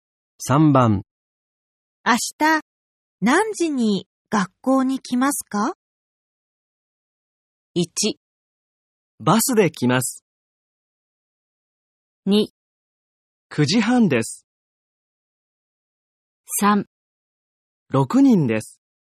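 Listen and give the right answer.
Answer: 2: 9時半です。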